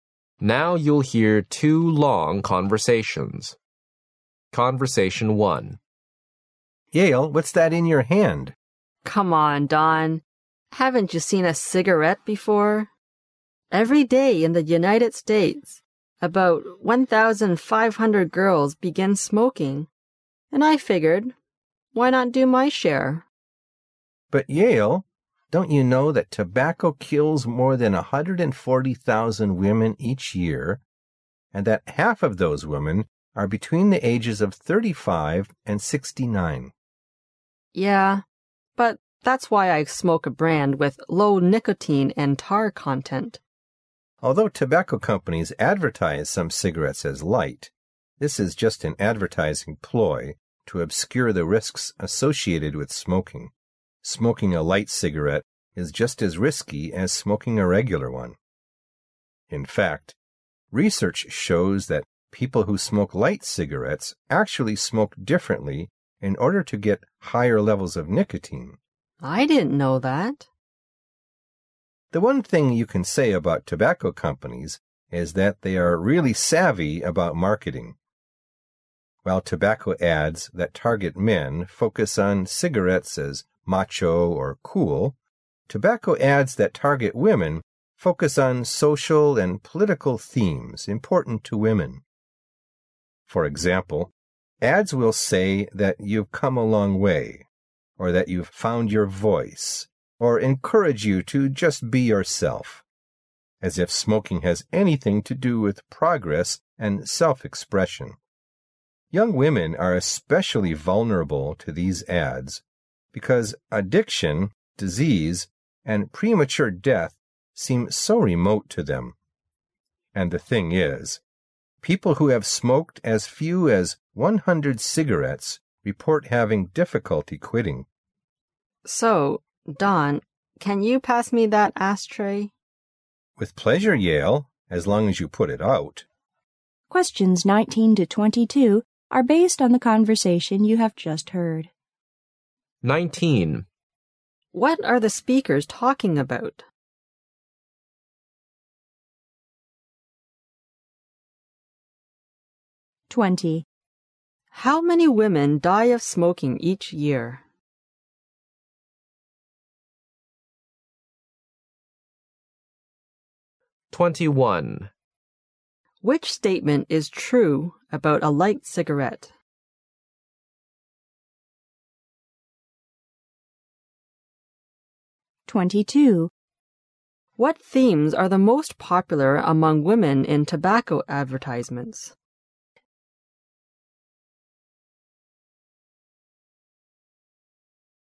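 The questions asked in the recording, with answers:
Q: How many women die of smoking each year?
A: More than 140,000

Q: Which statement is true about a light cigarette?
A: It is just as risky as a regular cigarette

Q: What themes are the most popular among women in tobacco advertisements?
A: Social and political themes important to women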